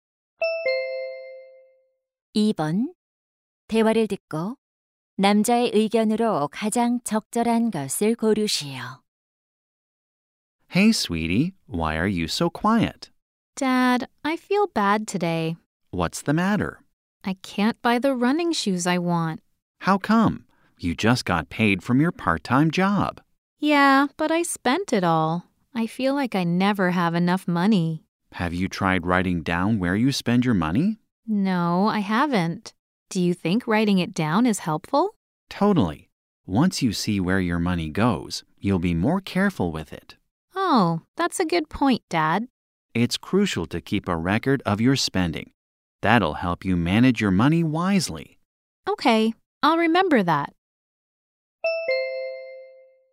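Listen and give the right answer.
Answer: 지출 내역을 기록하는 것이 돈 관리에 도움이 된다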